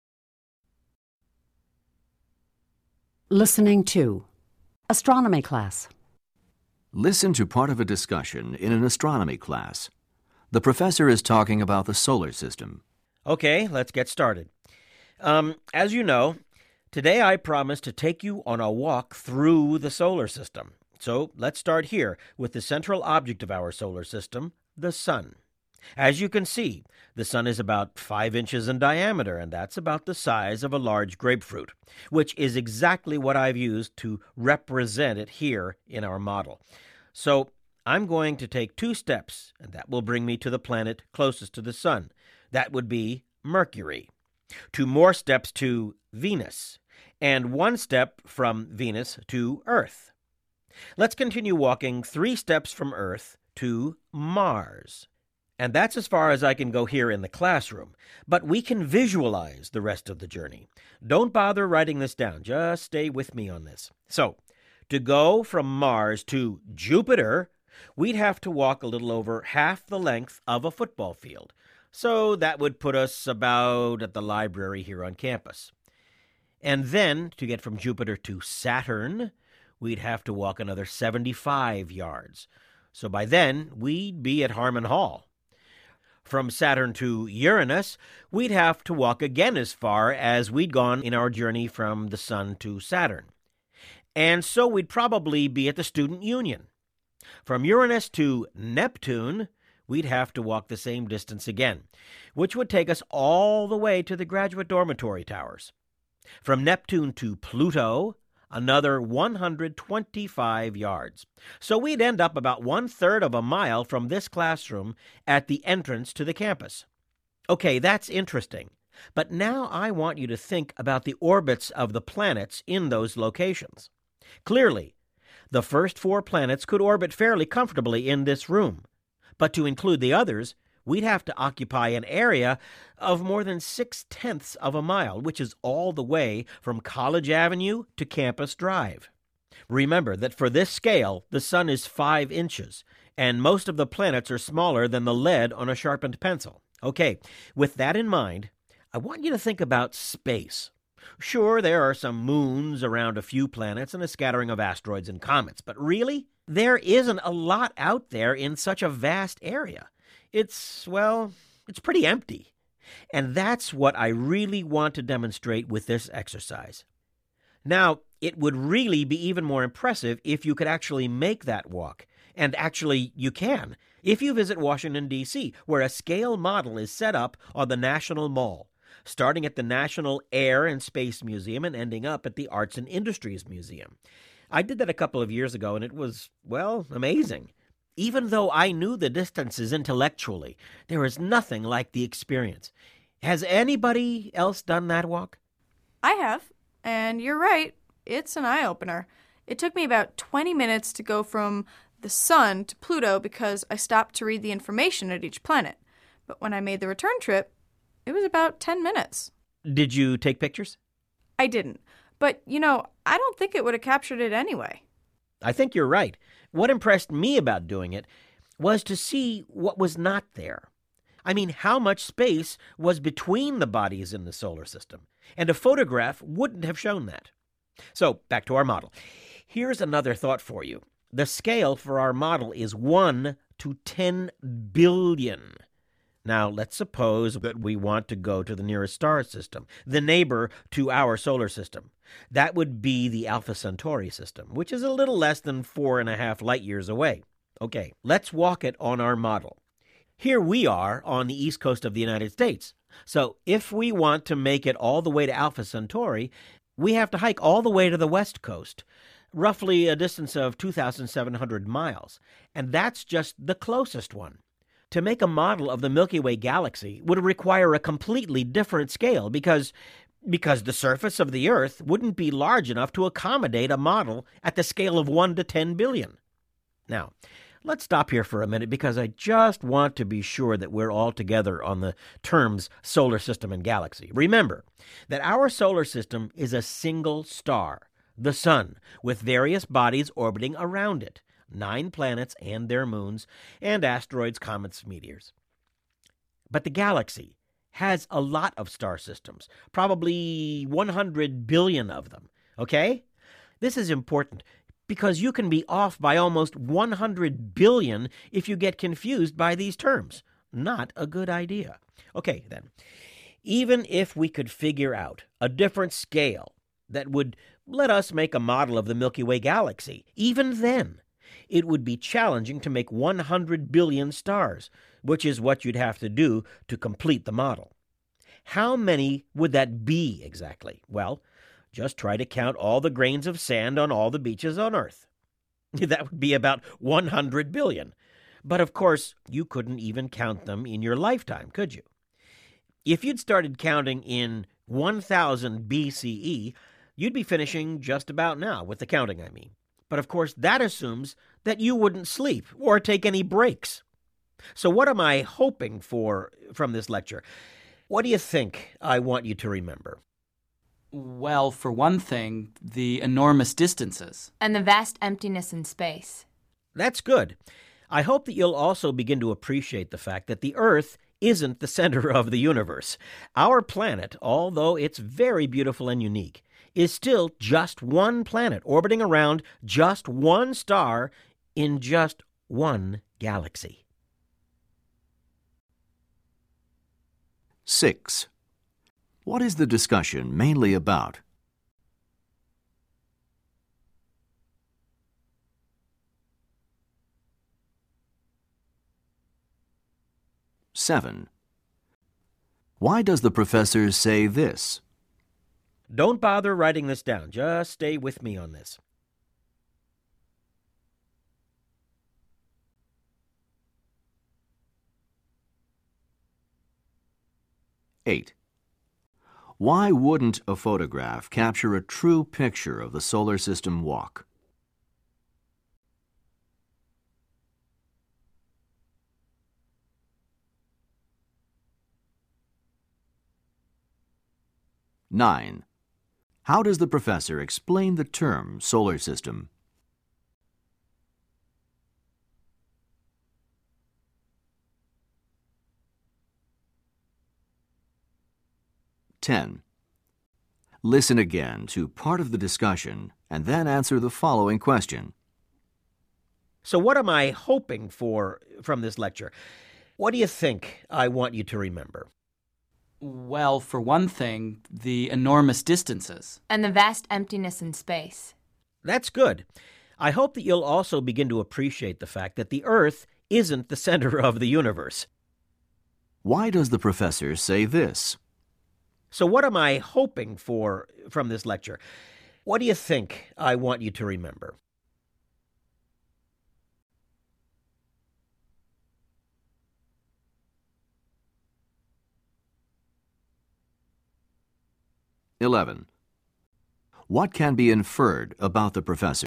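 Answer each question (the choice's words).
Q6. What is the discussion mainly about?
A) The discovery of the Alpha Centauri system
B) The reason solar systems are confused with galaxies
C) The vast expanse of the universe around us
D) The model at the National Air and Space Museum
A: The vast expanse of the universe around us

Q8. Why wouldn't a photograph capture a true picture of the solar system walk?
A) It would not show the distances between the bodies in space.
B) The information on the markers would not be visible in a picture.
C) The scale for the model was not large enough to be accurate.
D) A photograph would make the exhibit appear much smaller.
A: It would not show the distances between the bodies in space.

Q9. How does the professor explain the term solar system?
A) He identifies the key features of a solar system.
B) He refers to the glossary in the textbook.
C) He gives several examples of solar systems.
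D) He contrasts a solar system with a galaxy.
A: He contrasts a solar system with a galaxy.

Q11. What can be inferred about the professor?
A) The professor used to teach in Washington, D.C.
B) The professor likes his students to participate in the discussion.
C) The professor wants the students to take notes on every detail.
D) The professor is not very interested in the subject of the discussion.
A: The professor likes his students to participate in the discussion.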